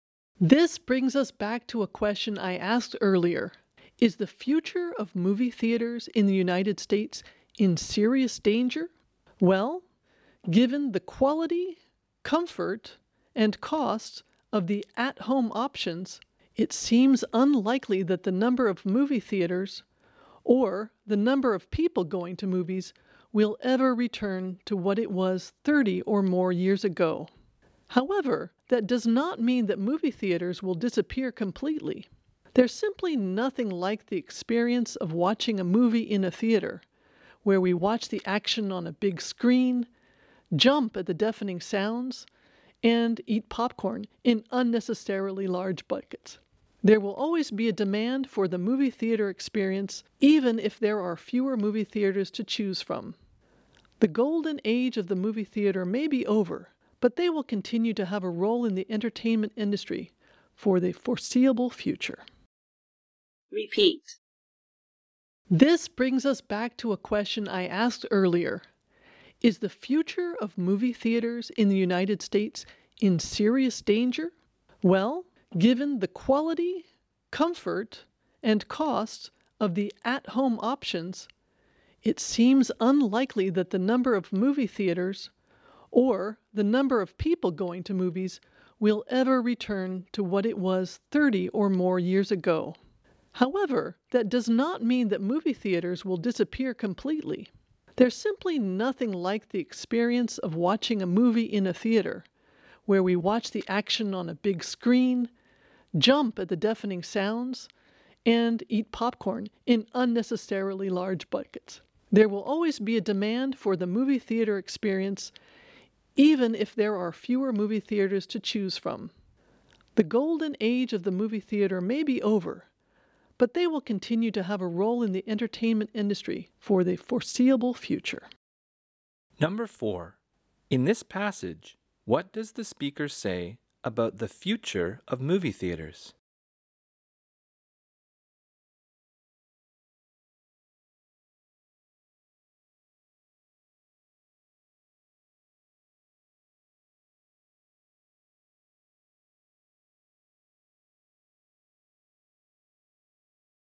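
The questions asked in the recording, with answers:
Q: In this passage, what does the speaker say about the future of movie theaters?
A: There will be fewer, but they will not disappear completely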